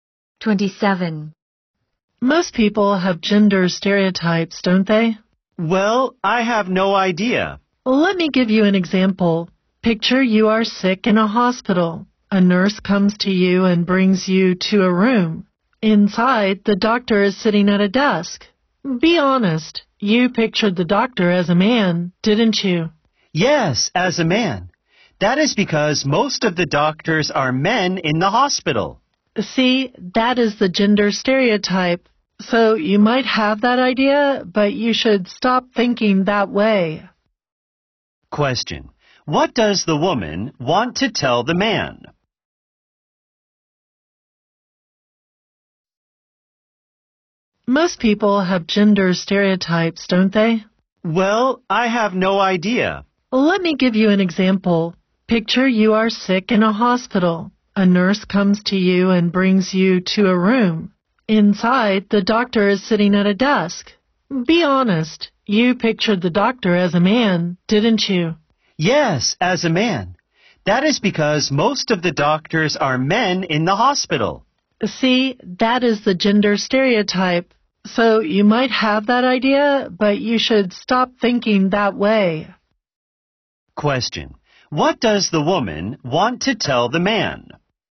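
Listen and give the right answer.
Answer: He should stop having gender stereotypes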